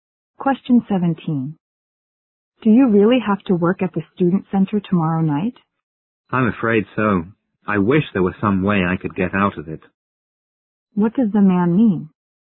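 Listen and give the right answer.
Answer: He has to work but wishes he didn't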